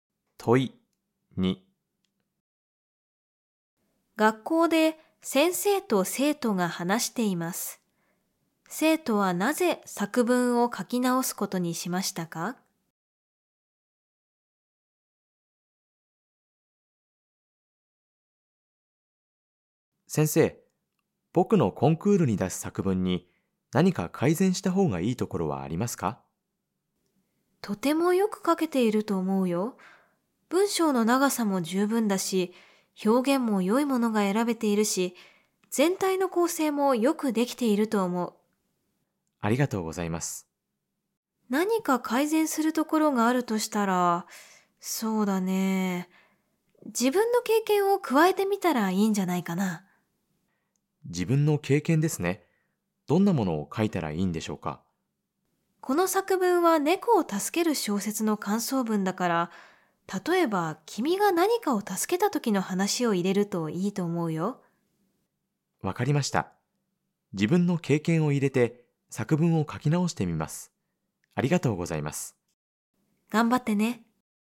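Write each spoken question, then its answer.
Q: 生徒はなぜ作文を書き直すことにしましたか?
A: 先生に自分の経験を加えるといいと言われたから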